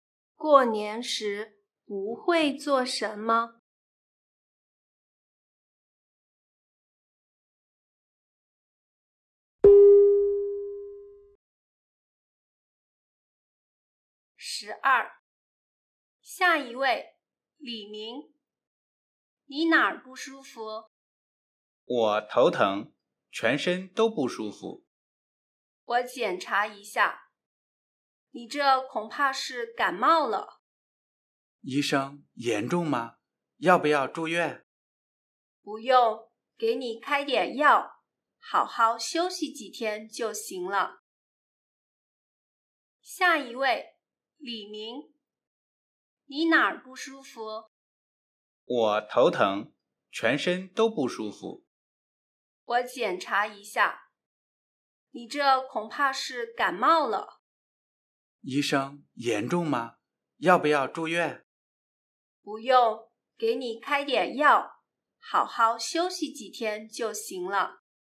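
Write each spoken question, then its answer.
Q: 男的怎么了?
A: 感冒了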